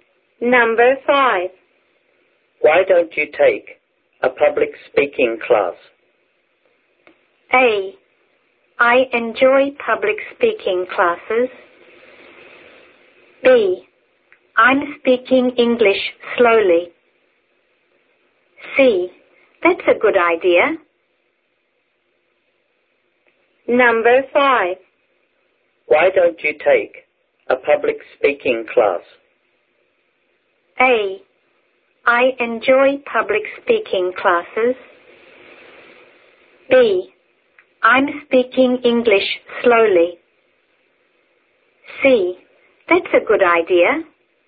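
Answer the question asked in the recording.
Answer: C: That's a good idea.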